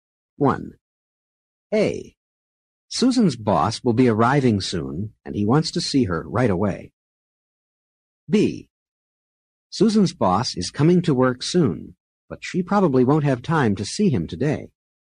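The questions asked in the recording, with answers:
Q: A. Susan's boss will be arriving soon and he wants to see her right away.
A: different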